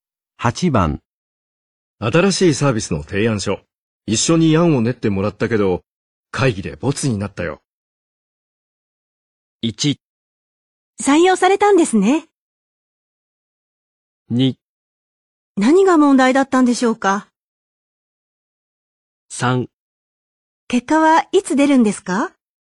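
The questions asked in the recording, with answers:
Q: 新しいサービスの提案書。一緒に案を練ってもらったけど、会議でボツになったよ。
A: 2: 何が問題だったんでしょうか。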